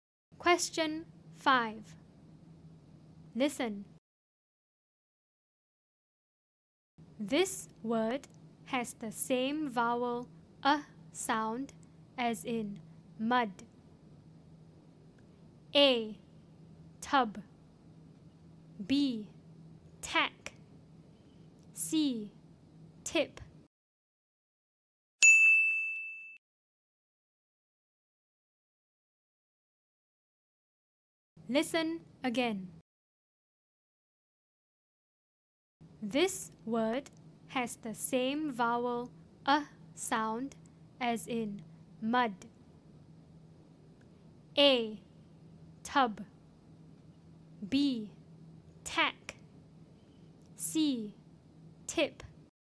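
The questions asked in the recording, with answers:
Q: This word has the same vowel a sound as in mud.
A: A: Tub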